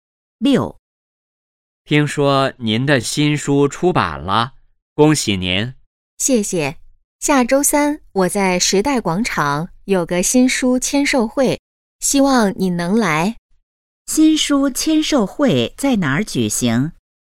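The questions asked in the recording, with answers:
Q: 新书签售会在哪儿举行?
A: 时代广场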